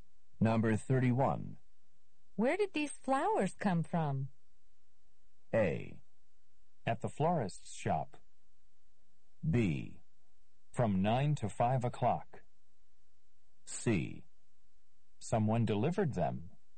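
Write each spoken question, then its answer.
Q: Where did these flowers come from?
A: C: Someone delivered them.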